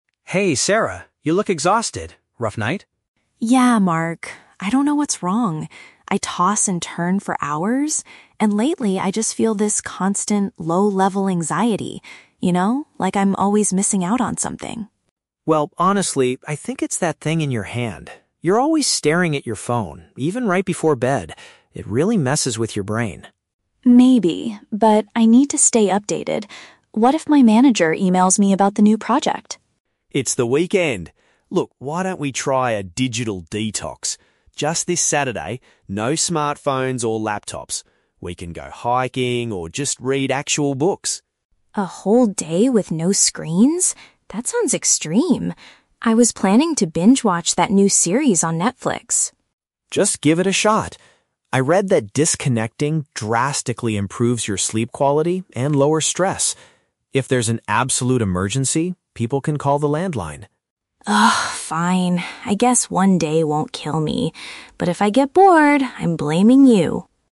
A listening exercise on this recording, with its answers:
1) What does Sarah think is the cause of her constant anxiety?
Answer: She is worried that she is missing out on information.

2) What is Mark's main suggestion for this Saturday?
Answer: To completely avoid using electronic devices.

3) How does Sarah react to Mark's proposal at the end of the conversation?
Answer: She reluctantly agrees to try it for one day.

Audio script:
Mark: Hey, Sarah. You look exhausted. Rough night?
Sarah: Yeah, Mark. I don't know what's wrong. I toss and turn for hours, and lately, I just feel this constant, low-level anxiety, you know? Like I'm always missing out on something.
Mark: Well, honestly, I think it's that thing in your hand. You're always staring at your phone, even right before bed. It really messes with your brain.
Sarah: Maybe. But I need to stay updated. What if my manager emails me about the new project?
Mark: It's the weekend! Look, why don't we try a digital detox? Just this Saturday, no smartphones or laptops. We can go hiking or just read actual books.
Sarah: A whole day with no screens? That sounds extreme. I was planning to binge-watch that new series on Netflix.
Mark: Just give it a shot. I read that disconnecting drastically improves your sleep quality and lowers stress. If there's an absolute emergency, people can call the landline.
Sarah: Ugh, fine. I guess one day won't kill me. But if I get bored, I'm blaming you.